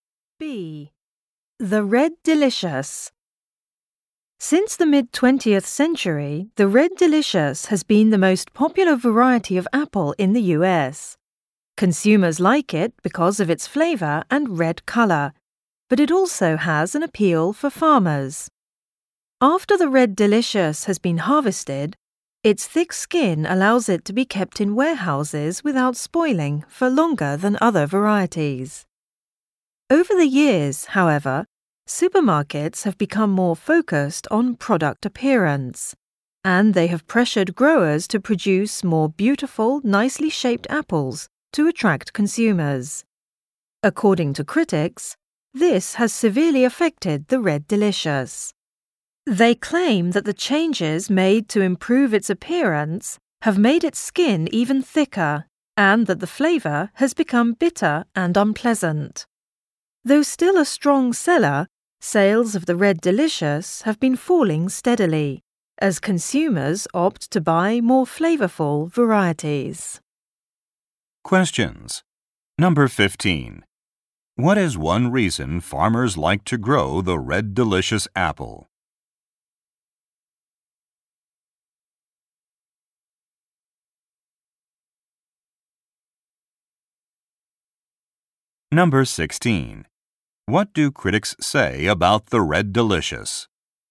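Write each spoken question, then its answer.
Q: What is one reason farmers like to grow the Red Delicious apple?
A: Its thick skin lets it be stored for a long time without spoiling.

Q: What do critics say about the Red Delicious?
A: Changes made to improve its looks have thickened its skin and made it taste bitter.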